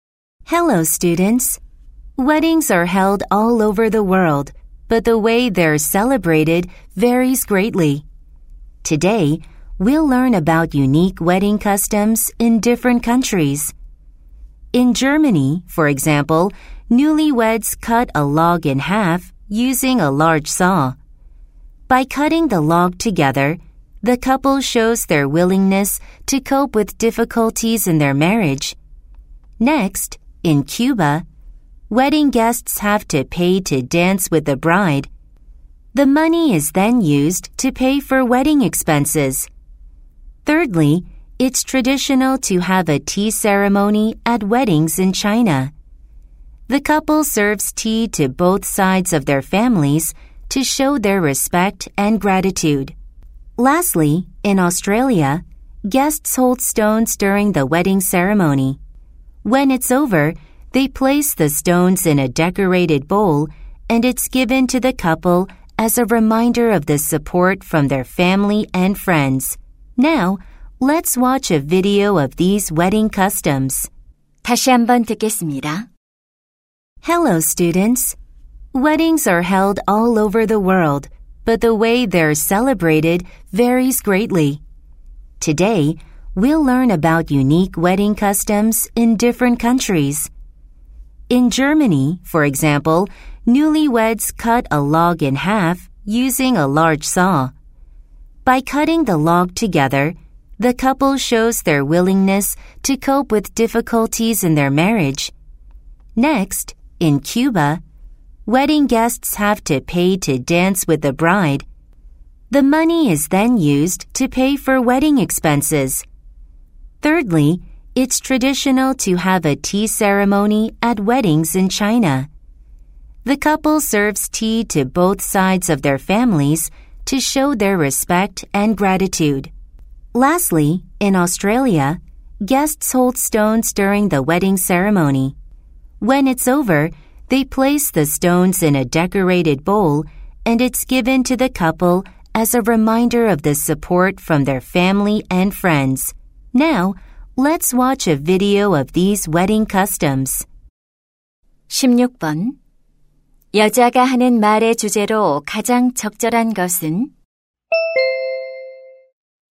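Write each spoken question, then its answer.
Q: 여자가 하는 말의 주제로 가장 적절한 것은?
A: 여러 나라의 독특한 결혼 풍습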